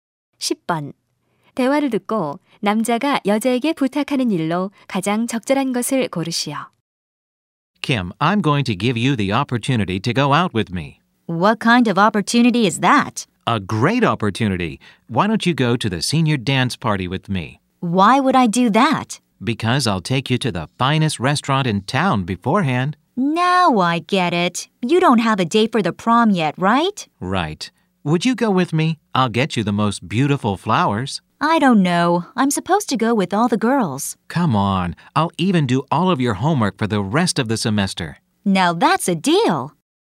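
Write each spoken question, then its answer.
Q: 대화를 듣고 남자가 여자에게 부탁하는 일로 가장 적절한 것을 고르시오.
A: 졸업 댄스파티에 함께 가기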